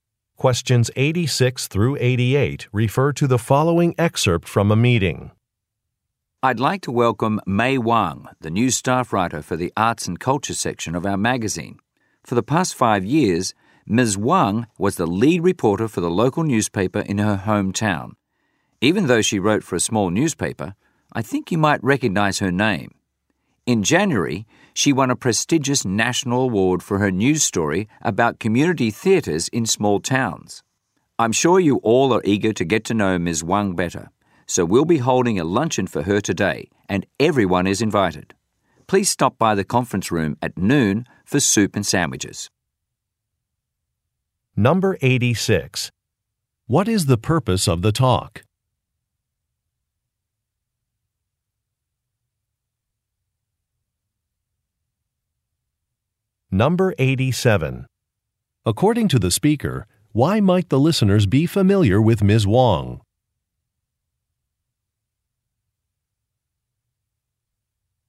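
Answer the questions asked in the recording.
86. To introduce a new staff writer
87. She won a prestigious national award
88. A welcome luncheon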